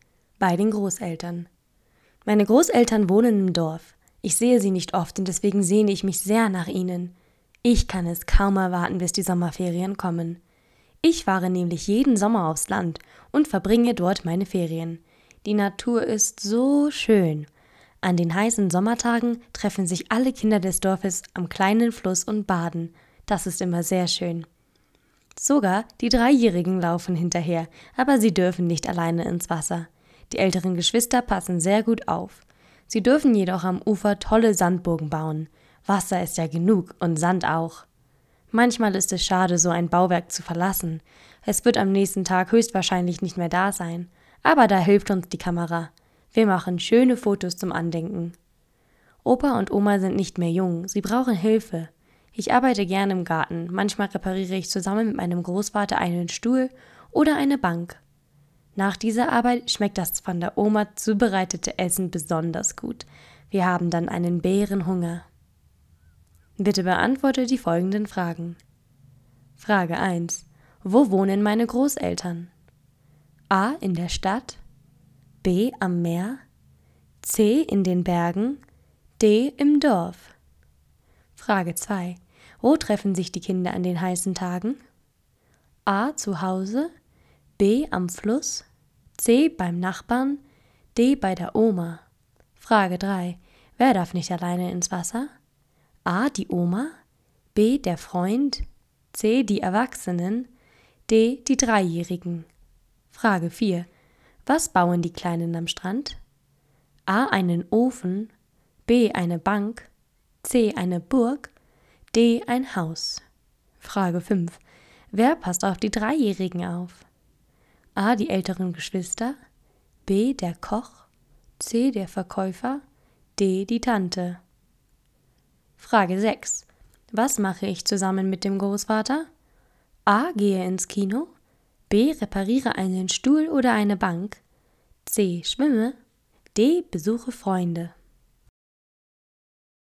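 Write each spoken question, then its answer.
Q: Wo wohnen meine Großeltern?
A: D: Im Dorf.

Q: Wo treffen sich die Kinder an den heißen Tagen?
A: B: Am Fluss.

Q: Wer darf nicht alleine ins Wasser?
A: D: Die Dreijährigen.

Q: Was bauen die Kleinen am Strand?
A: C: Eine Burg.

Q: Wer passt auf die Dreijährigen auf?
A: A: Die älteren Geschwister.

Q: Was mache ich zusammen mit dem Großvater?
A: B: Repariere einen Stuhl oder eine Bank.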